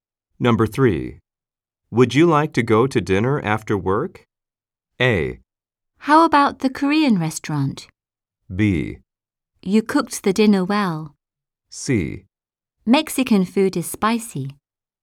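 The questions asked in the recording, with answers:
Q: Would you like to go to dinner after work?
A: A: How about the Korean restaurant?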